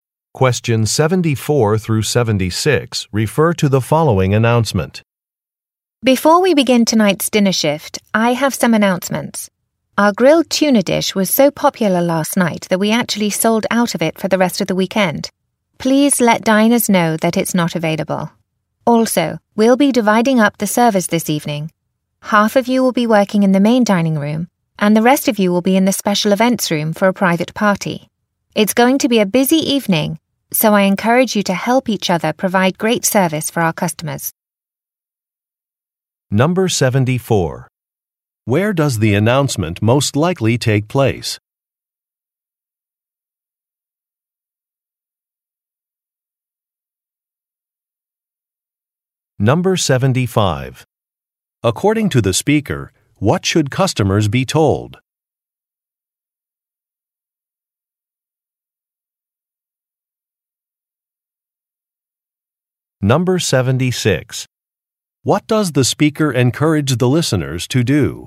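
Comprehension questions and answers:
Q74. Where does the announcement most likely take place?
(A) At a train station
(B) At a convention center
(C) At a restaurant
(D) At an outdoor market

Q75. According to the speaker, what should customers be told?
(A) The Wi-Fi is not working.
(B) A room is closed for renovations.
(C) A schedule has been changed.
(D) An item is unavailable.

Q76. What does the speaker encourage the listeners to do?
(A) Work together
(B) Arrive early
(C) Take extra shifts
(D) Greet customers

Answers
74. C
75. D
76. A

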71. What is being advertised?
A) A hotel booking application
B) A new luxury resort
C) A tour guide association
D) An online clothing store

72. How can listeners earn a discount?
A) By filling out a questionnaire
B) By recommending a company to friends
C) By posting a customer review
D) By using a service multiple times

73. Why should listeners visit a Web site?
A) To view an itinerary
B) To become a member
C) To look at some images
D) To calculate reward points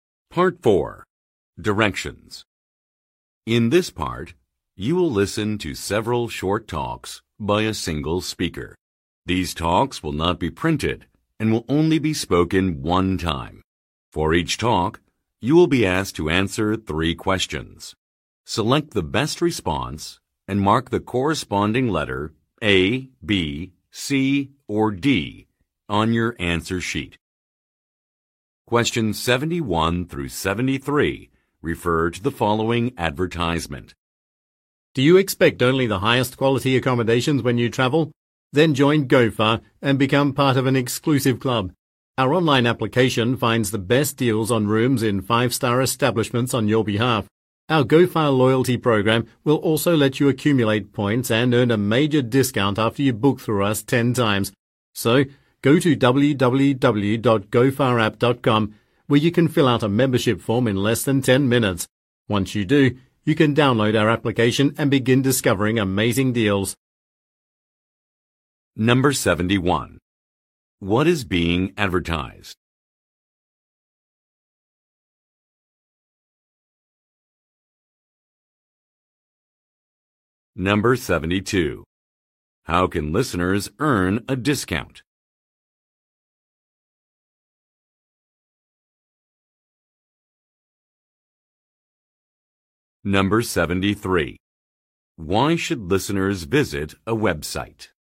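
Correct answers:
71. A
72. D
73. B

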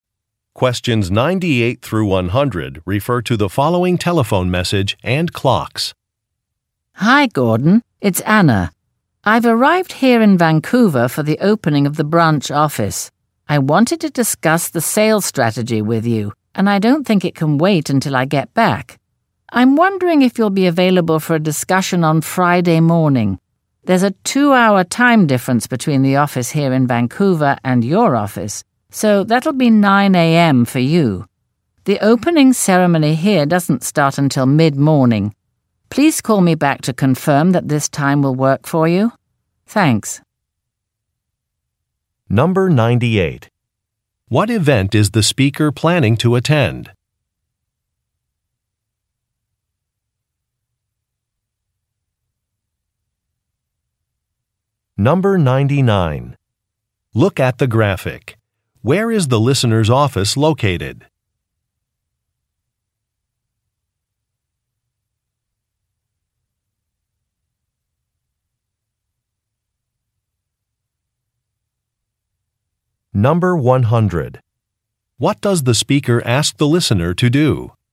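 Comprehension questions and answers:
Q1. What event is the speaker planning to attend?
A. A retirement celebration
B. A job interview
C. A trade show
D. A branch opening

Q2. What does the speaker ask the listener to do?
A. Return a phone call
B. Provide flight information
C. Authorize an expense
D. Verify an address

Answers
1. D
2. A

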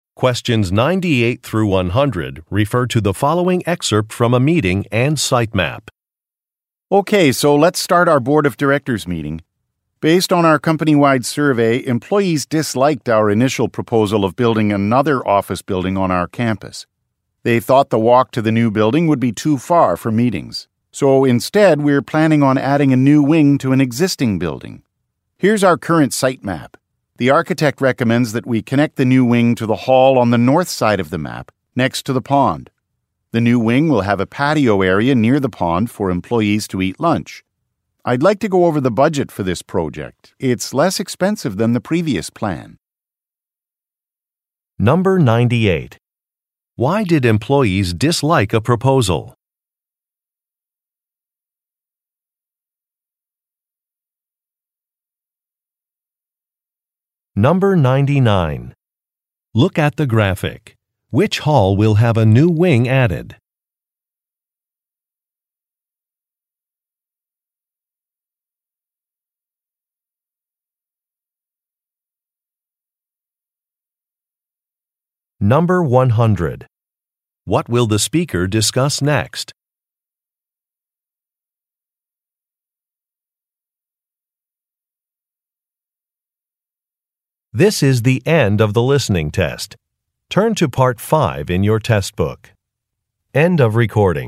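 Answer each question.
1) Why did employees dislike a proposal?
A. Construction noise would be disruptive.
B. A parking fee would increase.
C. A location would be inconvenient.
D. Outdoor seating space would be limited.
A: C

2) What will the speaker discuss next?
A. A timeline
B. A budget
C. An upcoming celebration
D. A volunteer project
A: B

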